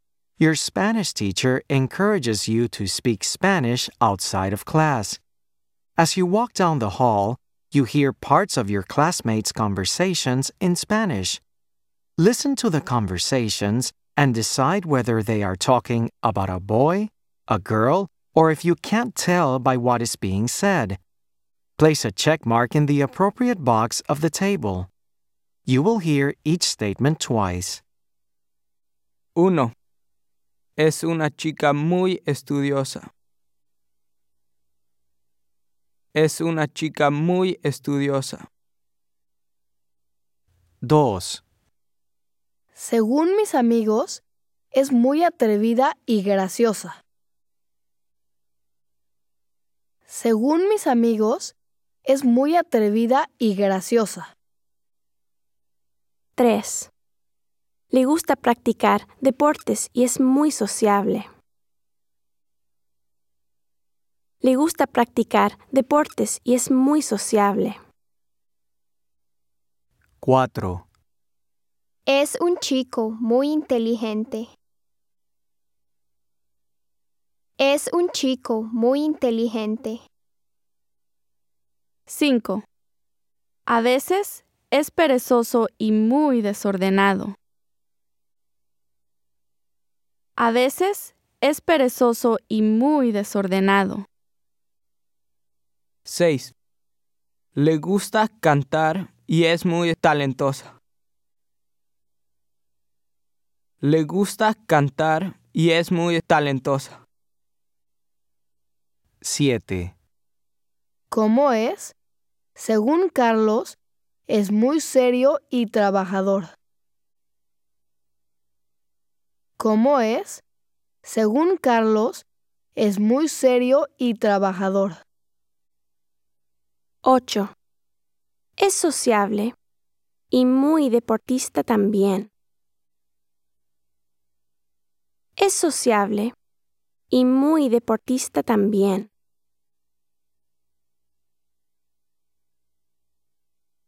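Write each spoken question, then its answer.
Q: Es una chica muy estudiosa.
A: a girl

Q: Según mis amigos, es muy atrevida y graciosa.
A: a girl

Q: Le gusta practicar deportes y es muy sociable.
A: can't tell

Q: Es un chico muy inteligente.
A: a boy

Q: A veces es perezoso y muy desordenado.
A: a boy

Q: Le gusta cantar y es muy talentosa.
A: a girl

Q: ¿Cómo es? Según Carlos, es muy serio y trabajador.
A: a boy

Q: Es sociable y muy deportista también.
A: can't tell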